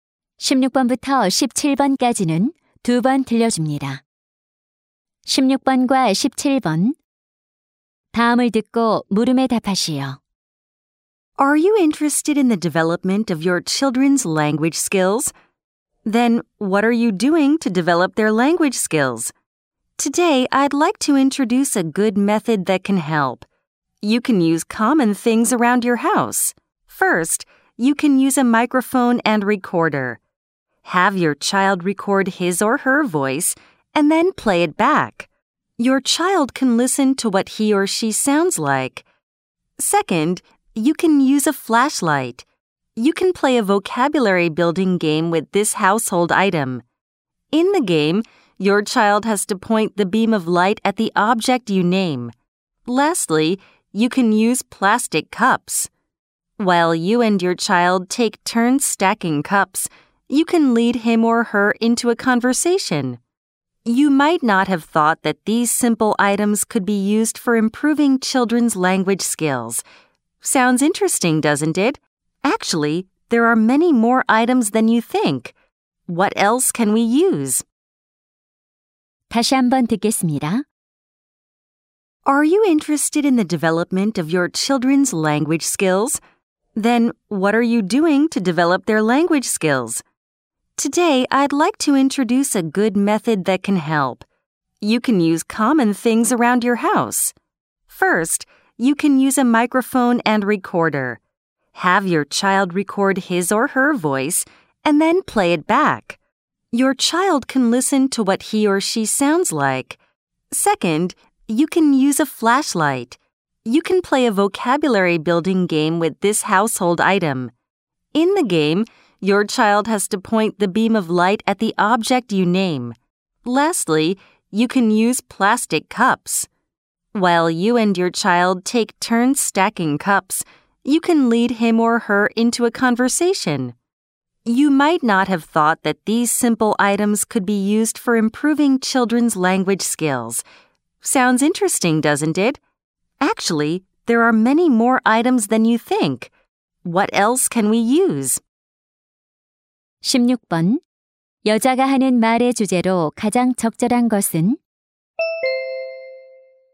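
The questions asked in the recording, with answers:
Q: 여자가 하는 말의 주제로 가장 적절한 것은?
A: 아이들의 언어 능력 발달에 도움이 되는 생활용품 활용법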